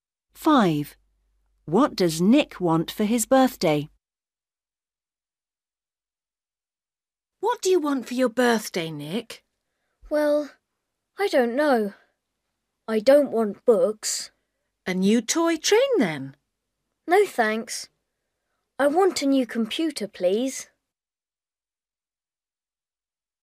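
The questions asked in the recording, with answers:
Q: What does Nick want for his birthday?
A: A new computer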